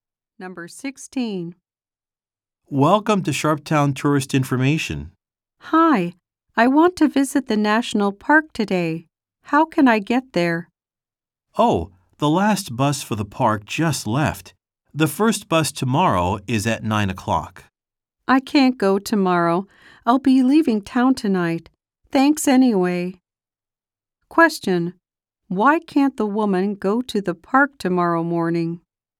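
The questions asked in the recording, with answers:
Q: Why can't the woman go to the park tomorrow morning?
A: She will be leaving town tonight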